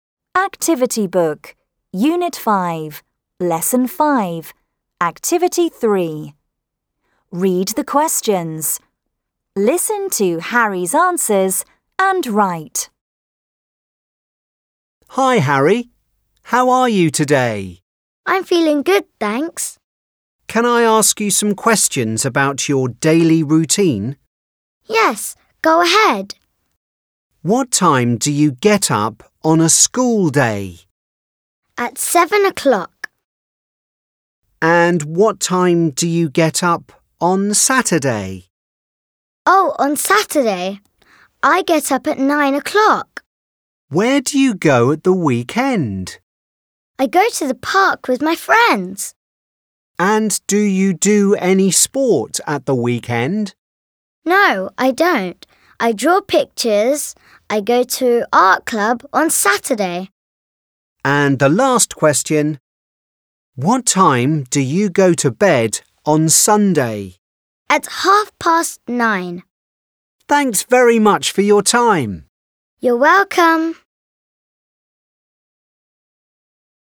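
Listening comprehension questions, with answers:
Listen and answer.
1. What time do you get up on a school day?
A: At 7 o'clock.

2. What time do you get up on Saturday?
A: At 9 o'clock.

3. Where do you go the weekend?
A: To the park with his friends.

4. Do you do any sport?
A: No, he doesn't. He draws pictures.

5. What time do you go to bed on Sunday?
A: At 9:30.

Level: ENGLISH 3RD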